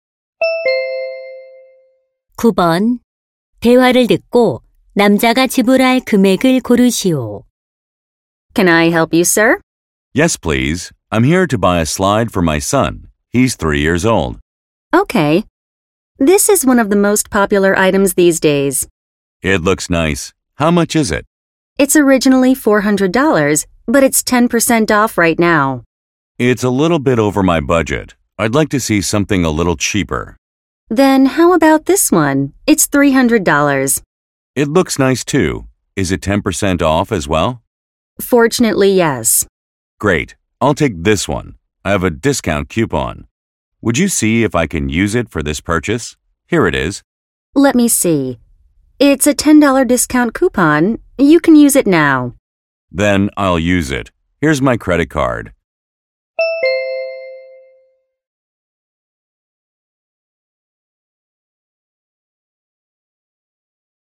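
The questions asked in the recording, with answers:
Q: 대화를 듣고 남자가 지불할 금액을 고르시오.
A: $260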